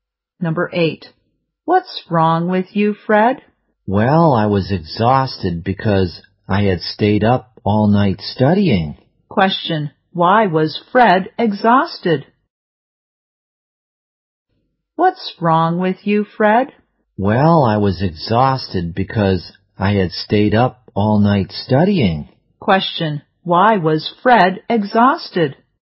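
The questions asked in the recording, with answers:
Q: why was Fred exhausted?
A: He stayed up all night studying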